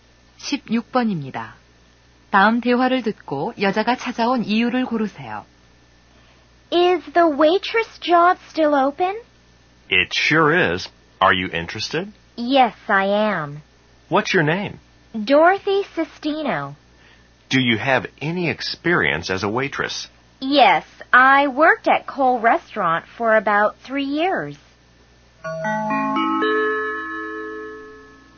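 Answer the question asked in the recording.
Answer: 웨이트리스 일자리에 지원하려고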